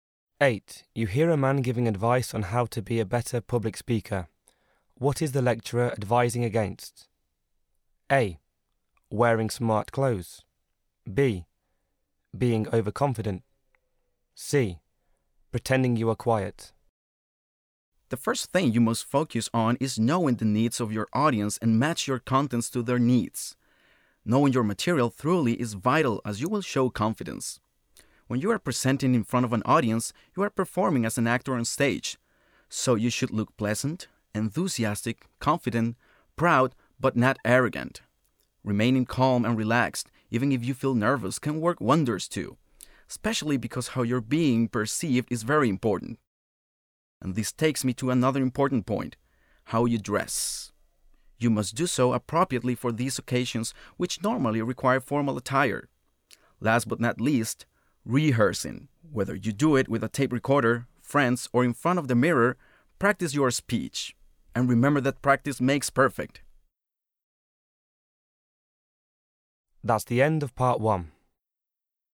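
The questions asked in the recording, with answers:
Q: What is the lecturer advising against?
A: B: Being overconfident.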